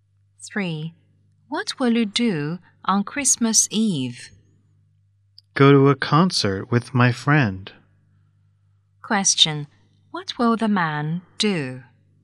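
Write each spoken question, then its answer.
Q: What will the man do?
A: Go to a concert with his friend.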